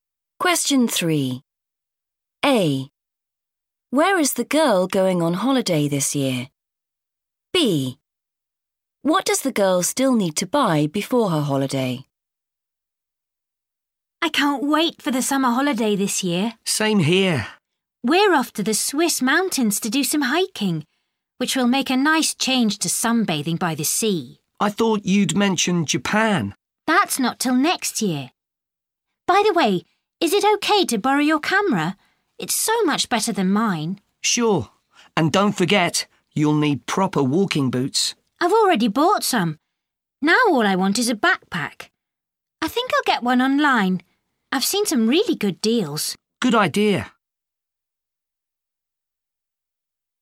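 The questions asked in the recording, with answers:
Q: Where is the girl going on holiday this year?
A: the Swiss mountains

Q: What does the girl still need to buy before her holiday?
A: a backpack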